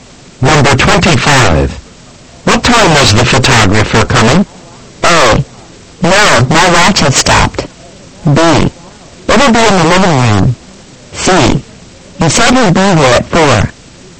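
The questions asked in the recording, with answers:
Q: What time was the photographer coming?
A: C: He said he'd be here at 4.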